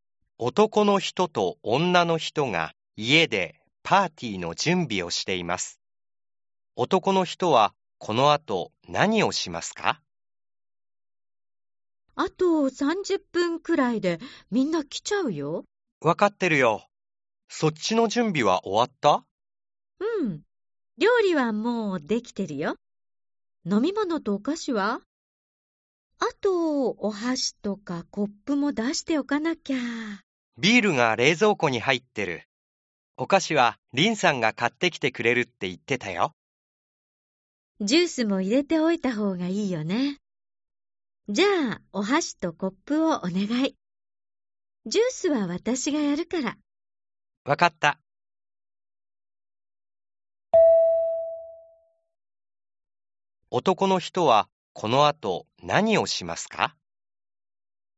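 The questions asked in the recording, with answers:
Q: 男の人はこの後何をしますか?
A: お箸とコップを出す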